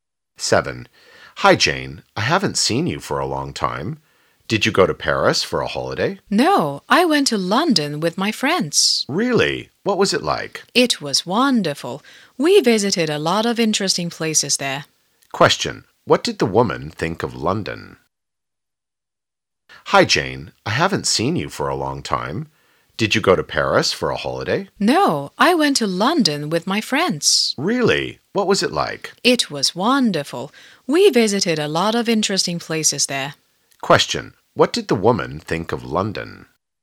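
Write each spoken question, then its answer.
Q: Question. What did the woman think of London?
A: It was wonderful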